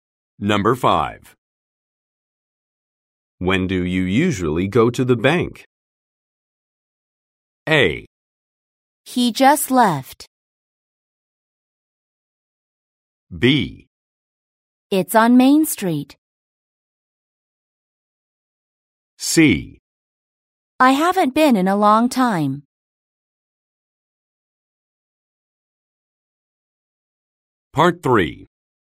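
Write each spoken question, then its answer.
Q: When do you usually go to the bank?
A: C: I haven't been in a long time.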